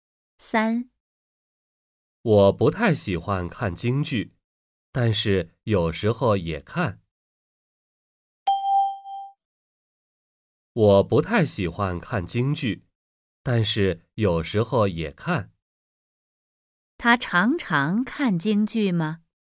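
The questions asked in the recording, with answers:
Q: 他常常看京剧吗?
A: 不常看,有时候看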